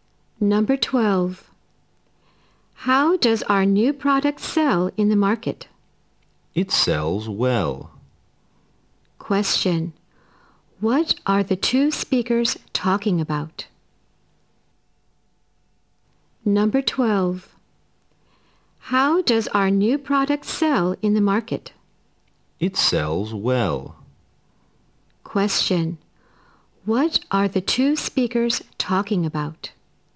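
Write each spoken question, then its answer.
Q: What are the two speakers talking about?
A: How the new product sells in the market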